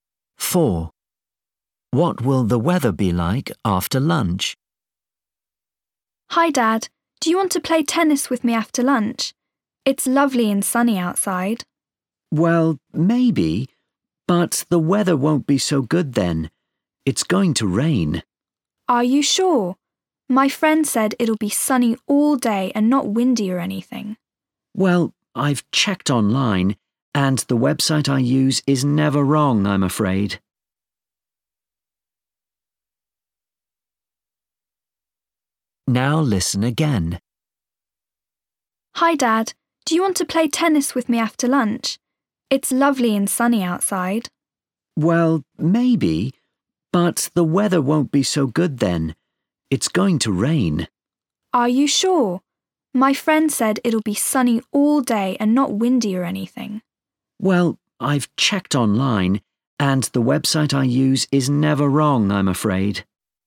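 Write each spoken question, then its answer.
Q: What will the weather be like after lunch?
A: Rainy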